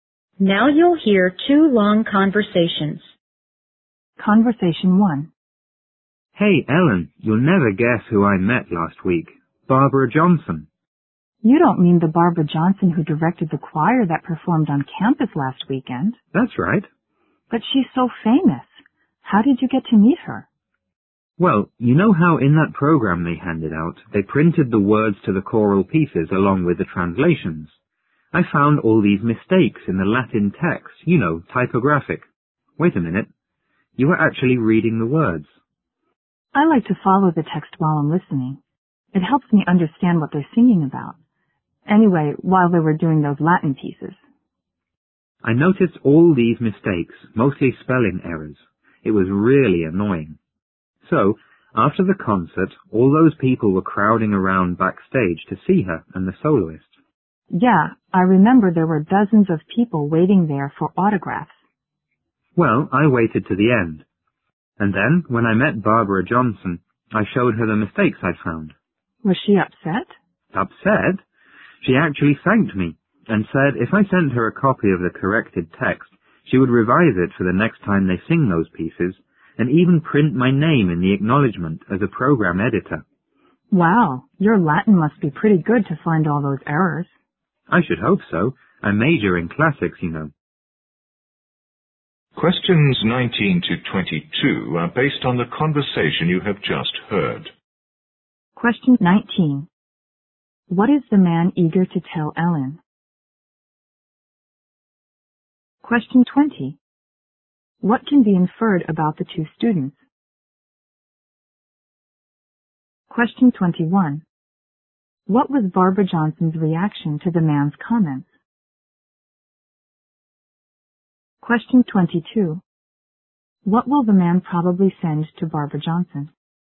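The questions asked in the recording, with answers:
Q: What is the man eager to tell Ellen?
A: He met Barbara Johnson

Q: What was Barbara Johnson's reaction to the man's comments?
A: She thanked him

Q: What will the man probably send to Barbara Johnson?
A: A corrected copy of the Latin text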